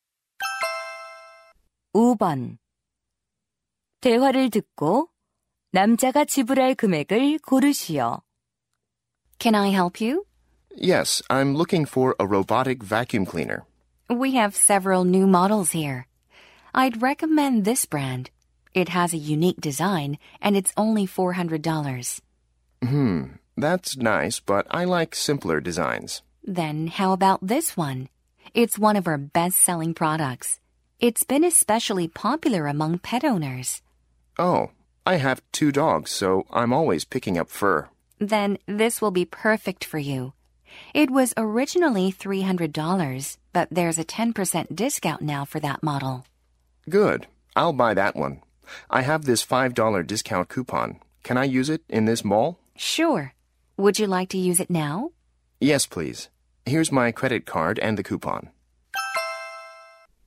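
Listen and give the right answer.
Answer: $265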